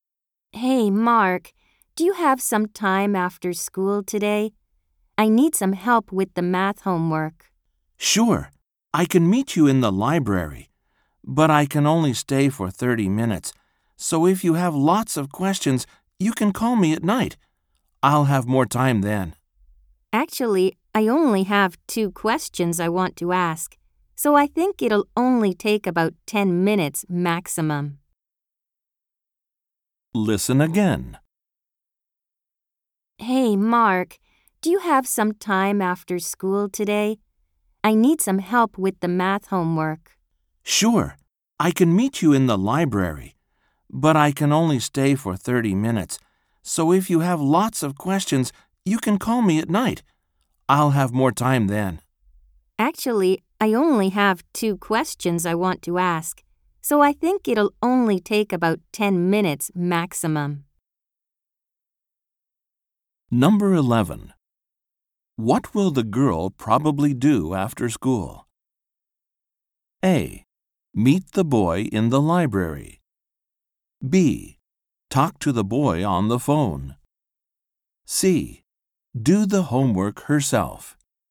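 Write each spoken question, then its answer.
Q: What will the girl probably do after school?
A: A: Meet the boy in the library.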